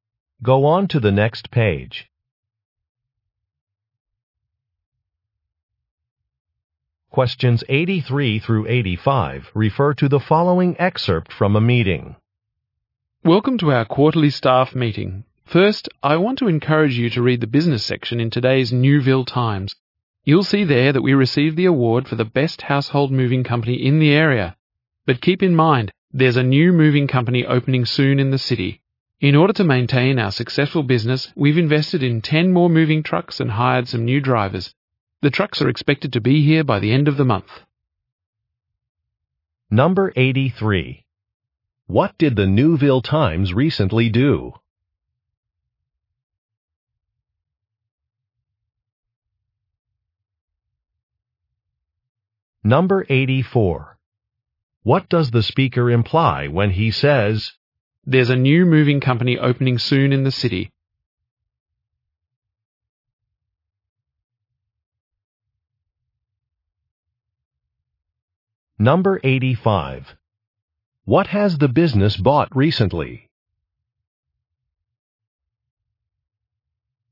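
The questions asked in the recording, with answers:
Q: What did the Newville Times recently do?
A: Reported that the company won the best moving company award

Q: What has the business bought recently?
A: 10 more moving trucks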